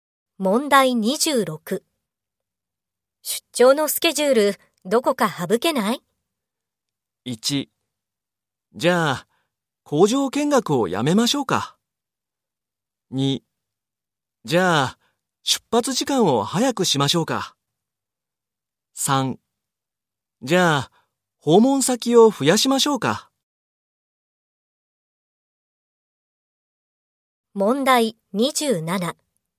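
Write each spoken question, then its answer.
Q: 出張のスケジュール、どこか省けない?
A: 1: じゃあ、工場見学をやめましょうか。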